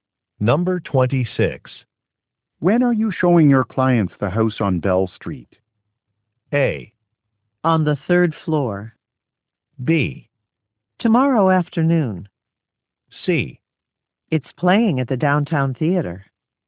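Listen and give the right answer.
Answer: B: Tomorrow afternoon.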